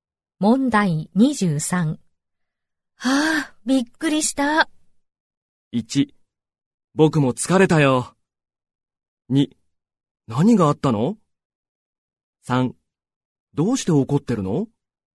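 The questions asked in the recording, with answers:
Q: はあ、びっくりした。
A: 2: 何があったの?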